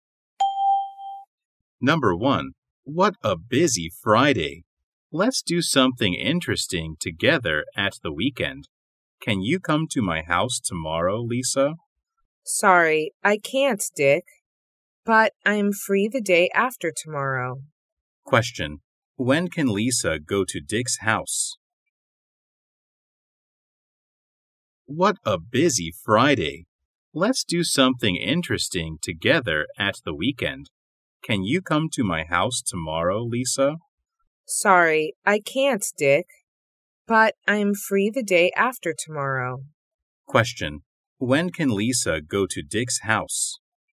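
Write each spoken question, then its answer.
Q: When can Lisa go to Dick's house?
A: On Sunday (the day after tomorrow)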